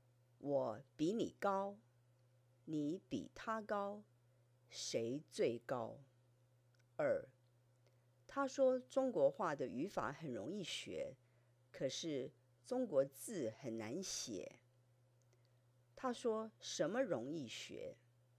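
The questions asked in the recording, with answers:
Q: 他说什么容易学?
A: 中国话的语法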